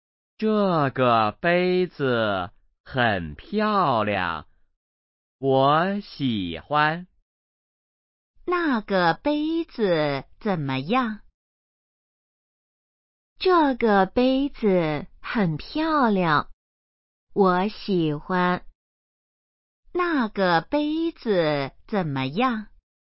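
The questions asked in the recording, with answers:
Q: 那个杯子怎么样?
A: 很漂亮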